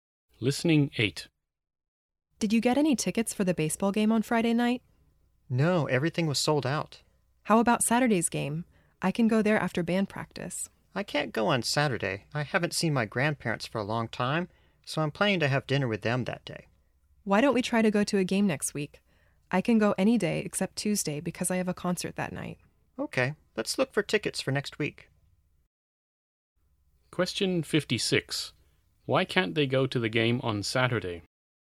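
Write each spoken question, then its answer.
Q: Why can't they go to the game on Saturday?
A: One of them is having dinner with grandparents.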